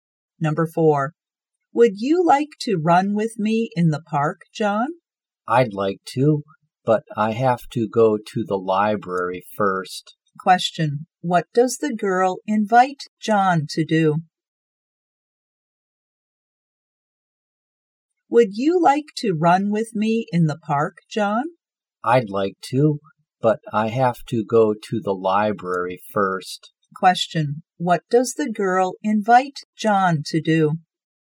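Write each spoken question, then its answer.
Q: what does the girl invite John to do?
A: To run with her in the park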